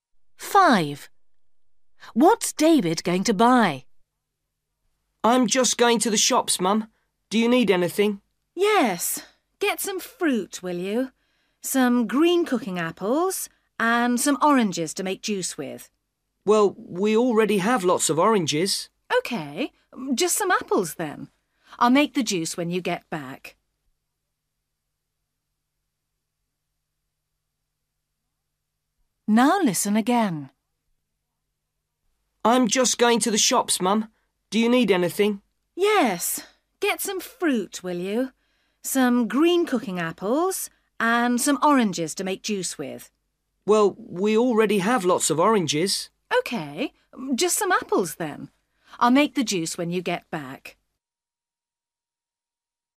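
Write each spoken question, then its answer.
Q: What's David going to buy?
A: Green cooking apples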